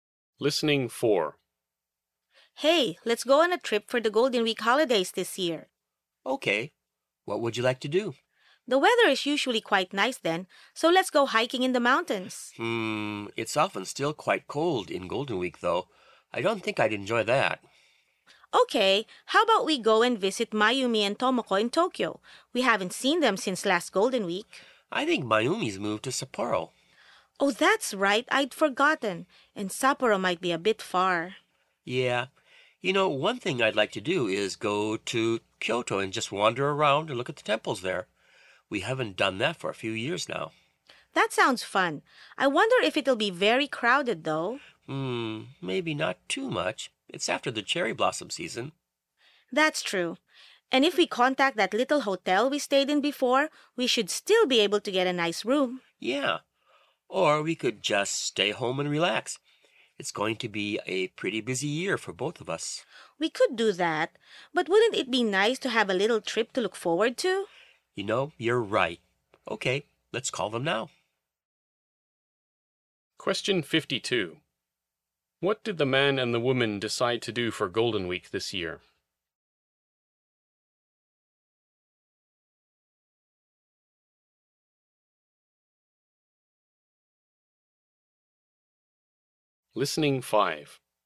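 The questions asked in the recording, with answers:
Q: What did the man and the woman decide to do for Golden Week this year?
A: Go to Kyoto and look at the temples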